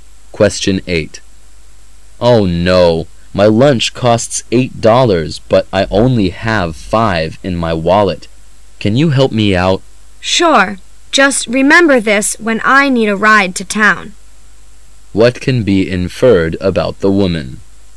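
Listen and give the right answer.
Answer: She will lend the man money and expects a ride to town in return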